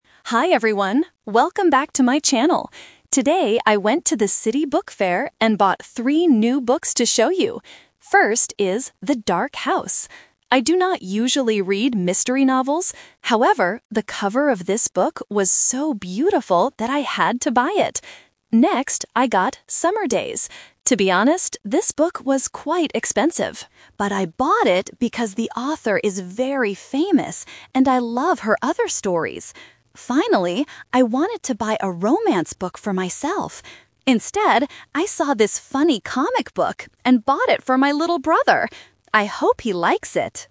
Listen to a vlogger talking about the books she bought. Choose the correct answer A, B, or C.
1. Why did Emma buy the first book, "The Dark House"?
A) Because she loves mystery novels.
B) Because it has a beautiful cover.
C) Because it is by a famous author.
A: Because it has a beautiful cover.

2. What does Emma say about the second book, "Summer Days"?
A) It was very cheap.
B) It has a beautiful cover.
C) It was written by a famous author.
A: It was written by a famous author.

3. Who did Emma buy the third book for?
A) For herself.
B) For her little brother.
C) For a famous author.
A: For her little brother.

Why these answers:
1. Emma says, "However, the cover of this book was so beautiful that I had to buy it!" Trap: Option A is a trap using negative meaning. She says she does not usually read mystery novels. Option C is the reason she bought the second book, not the first one.
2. Emma explains, "I bought it because the author is very famous." Trap: Option A is a trap because she actually says the book was "quite expensive," which is the opposite of cheap. Option B is a trap because the beautiful cover belongs to the first book.
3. Emma clearly states, "Instead, I saw this funny comic book and bought it for my little brother." Trap: Option A is a strong trap. She says "I wanted to buy a romance book for myself," but uses the word "Instead" to show she changed her mind.

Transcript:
Emma: Hi everyone, welcome back to my channel! Today, I went to the city book fair and bought three new books to show you. First is "The Dark House". I do not usually read mystery novels. However, the cover of this book was so beautiful that I had to buy it! Next, I got "Summer Days". To be honest, this book was quite expensive. But I bought it because the author is very famous, and I love her other stories. Finally, I wanted to buy a romance book for myself. Instead, I saw this funny comic book and bought it for my little brother. I hope he likes it!

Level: A2

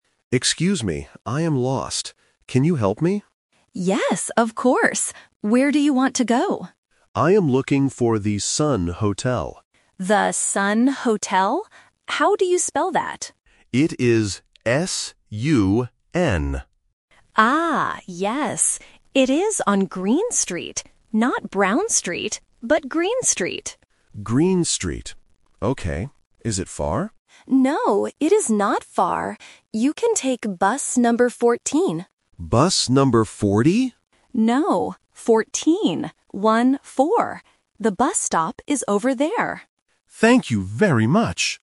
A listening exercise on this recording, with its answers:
Listen to the conversation and choose the correct answer (A, B, or C).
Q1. How does the tourist spell the name of the hotel?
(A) S-A-N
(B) S-U-N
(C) S-O-N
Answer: S-U-N

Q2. What street is the hotel on?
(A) Green Street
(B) Brown Street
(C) Blue Street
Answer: Green Street

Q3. What bus number should the tourist take?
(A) Bus 4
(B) Bus 14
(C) Bus 40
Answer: Bus 14

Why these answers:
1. The tourist spells the name of the hotel clearly: S-U-N. Options (A) and (C) use different vowels ("A" and "O") which are common spelling traps for beginners.
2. The local says, "It is on Green Street." Option (B) is the trap because the local mentions "Brown Street" in a negative sentence ("Not Brown Street"). Option (C) is not mentioned.
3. The local tells the tourist to take bus number 14. The tourist mishears it as "Bus number 40" (The Trap), but the local corrects him: "No, 14. One-four." This tests the student's ability to hear the difference between "-teen" and "-ty".

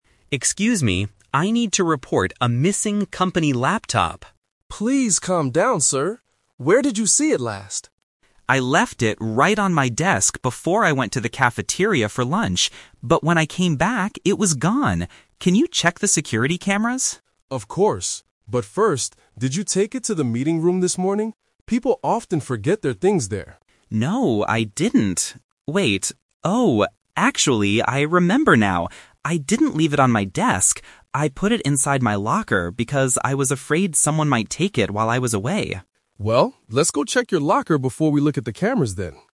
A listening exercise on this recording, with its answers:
Listen to the conversation and circle the correct answer (A, B, or C).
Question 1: Where did the man go for his lunch break?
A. To the meeting room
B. To his desk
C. To the cafeteria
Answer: To the cafeteria

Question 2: What did the man ask the security officer to do?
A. Check the security cameras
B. Open his locker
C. Call the police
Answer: Check the security cameras

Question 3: Where is the laptop most likely right now?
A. On his desk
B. In his locker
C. In the meeting room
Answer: In his locker

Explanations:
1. Mark says, "before I went to the cafeteria for lunch." Option (A) is a trap because the meeting room is mentioned later by the officer. Option (B) is a trap because the desk is where he thought he left the laptop, not where he went for lunch.
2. Mark explicitly asks, "Can you check the security cameras?" Option (B) is a trap; the officer suggests checking the locker at the end, but Mark didn't ask him to open it. Option (C) is a plausible action for a lost item but is not mentioned in the audio.
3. This is "The Twist". Mark initially thought he left it on his desk (Option A - Trap), and the officer guessed it might be in the meeting room (Option C - Trap). However, Mark suddenly remembers the truth: "I put it inside my locker".

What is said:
Mark (Employee): Excuse me, I need to report a missing company laptop!
Security Officer: Please calm down, sir. Where did you see it last?
Mark: I left it right on my desk before I went to the cafeteria for lunch. But when I came back, it was gone! Can you check the security cameras?
Security Officer: Of course. But first, did you take it to the meeting room this morning? People often forget their things there.
Mark: No, I didn't. Wait... oh, actually, I remember now. I didn't leave it on my desk. I put it inside my locker because I was afraid someone might take it while I was away.

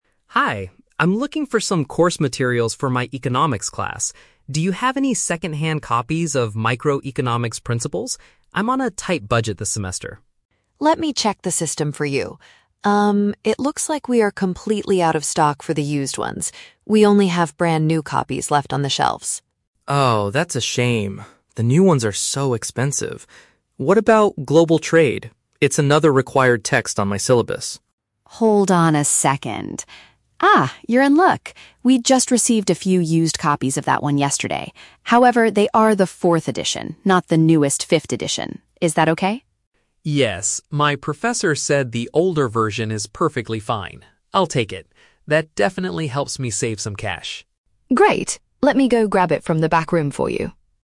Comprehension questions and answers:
Listen to the conversation between a university student and a bookstore clerk, and choose the correct answer (A, B, or C) for each question.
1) Why is Liam asking for used books?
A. He wants to avoid spending a large amount of money.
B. He prefers reading older editions of textbooks.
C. He is looking for a book that is no longer printed.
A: He wants to avoid spending a large amount of money.

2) What does the clerk say about the "Microeconomics Principles" book?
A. It was just delivered to the store the previous day.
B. The bookstore has entirely run out of the used versions.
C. It is currently the most expensive item on the syllabus.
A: The bookstore has entirely run out of the used versions.

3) Why does Liam agree to buy the "Global Trade" book?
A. It is the newest version available on the market.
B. The clerk offered him an extra discount on the price.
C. His teacher approved the use of a previous publication.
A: His teacher approved the use of a previous publication.

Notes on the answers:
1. The Key: Liam mentions he is on a "tight budget" and wants to "save some cash." Option A paraphrases this as wanting to "avoid spending a large amount of money." The Trap: Option (B) is a trap. He does accept an older edition later, but it is not his reason for wanting used books (his reason is financial). Option (C) is a plausible situation in a bookstore but is never mentioned.
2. The Key: Rita says, "we are completely out of stock for the used ones." Option B paraphrases "completely out of stock" as "entirely run out". The Trap: Option (A) is a trap. The clerk mentions something being received "yesterday" (the previous day), but that was the Global Trade book, not Microeconomics Principles. Option (C) mentions "expensive", but the audio only says new books generally are expensive, not that this specific one is the most expensive on the syllabus.
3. The Key: Liam says, "my professor said the older version is perfectly fine." Option C paraphrases "professor" as "teacher" and "older version" as "previous publication." The Trap: Option (A) is a trap because the book is the fourth edition, and Rita explicitly states it is "not the newest fifth edition." Option (B) is a logical guess for someone trying to save money, but the clerk did not offer an extra discount; the book is just cheaper because it's used.

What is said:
Liam: Hi, I'm looking for some course materials for my Economics class. Do you have any second-hand copies of "Microeconomics Principles"? I'm on a tight budget this semester.
Rita: Let me check the system for you. Um, it looks like we are completely out of stock for the used ones. We only have brand new copies left on the shelves.
Liam: Oh, that's a shame. The new ones are so expensive. What about "Global Trade"? It's another required text on my syllabus.
Rita: Hold on a second. Ah, you're in luck! We just received a few used copies of that one yesterday. However, they are the fourth edition, not the newest fifth edition. Is that okay?
Liam: Yes, my professor said the older version is perfectly fine. I'll take it. That definitely helps me save some cash.
Rita: Great. Let me go grab it from the back room for you.

